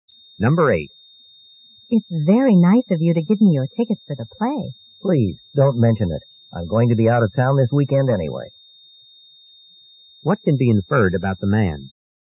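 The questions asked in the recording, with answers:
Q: What can be inferred about the man?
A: He can't use the tickets because he'll be out of town.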